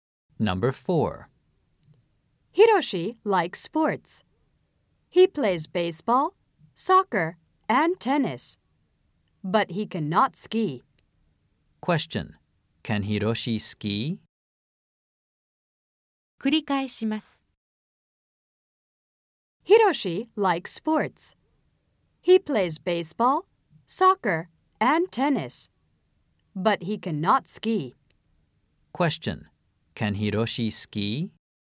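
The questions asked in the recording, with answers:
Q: Can Hiroshi ski?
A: No, he can't.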